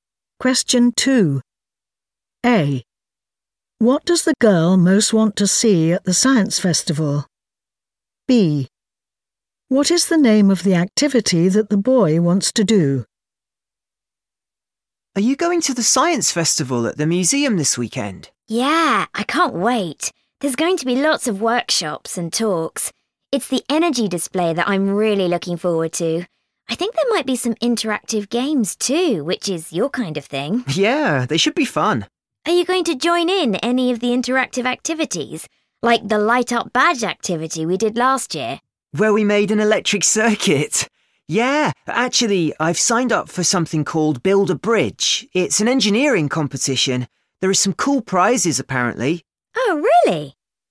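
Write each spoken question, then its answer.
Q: What does the girl most want to see at the science festival?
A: the energy display

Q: What is the name of the activity that the boy wants to do?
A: Build a Bridge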